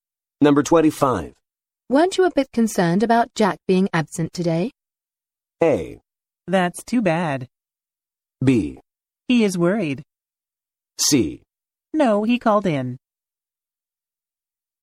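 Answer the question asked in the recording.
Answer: C: No, he called in.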